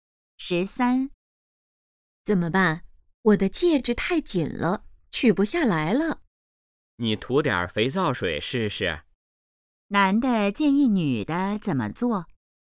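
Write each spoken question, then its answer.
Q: 男的建议女的怎么做?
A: 涂点肥皂水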